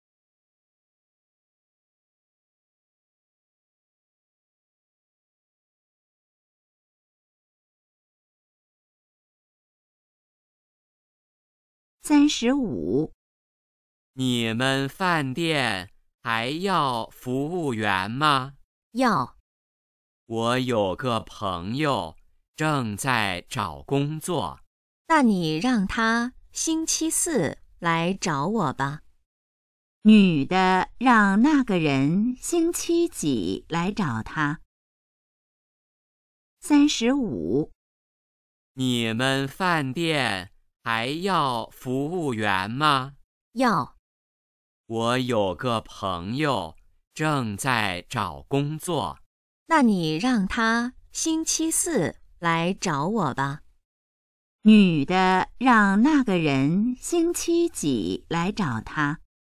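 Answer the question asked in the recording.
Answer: 星期四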